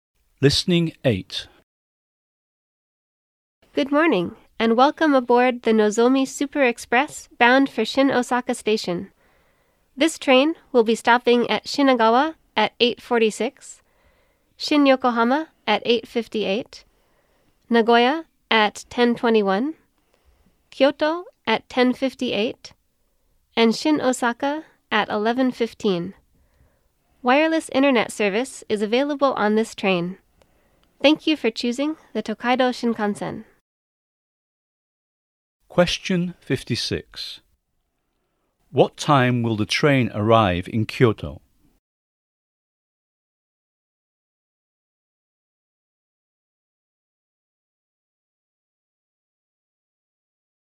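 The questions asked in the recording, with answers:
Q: What time will the train arrive in Kyoto?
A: 10:58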